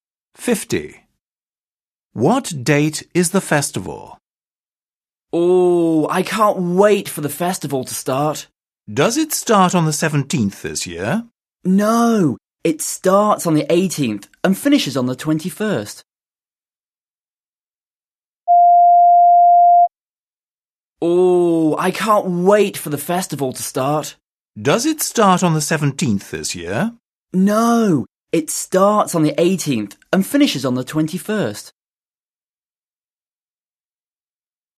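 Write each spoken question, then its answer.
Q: What date is the festival?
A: the 18th to the 21st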